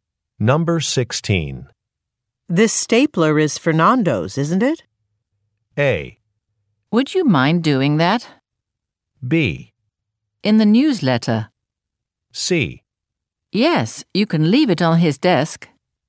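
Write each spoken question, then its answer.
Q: This stapler is Fernando's, isn't it?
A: C: Yes, you can leave it on his desk.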